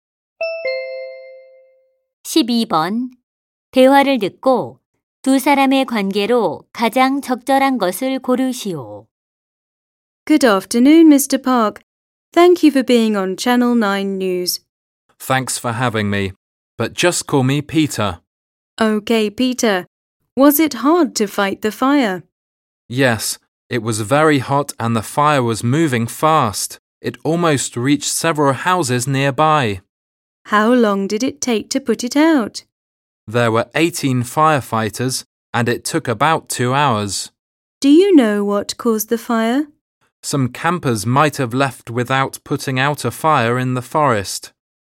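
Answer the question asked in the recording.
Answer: 기자 - 소방관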